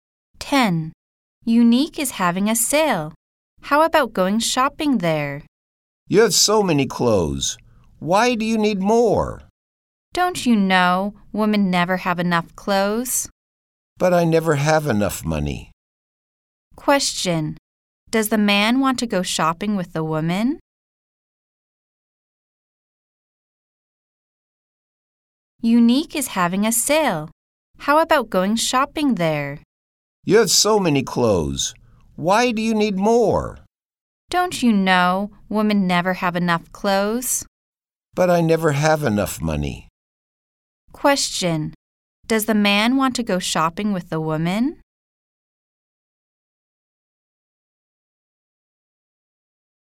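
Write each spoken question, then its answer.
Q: Does the man want to go shopping with the woman?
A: No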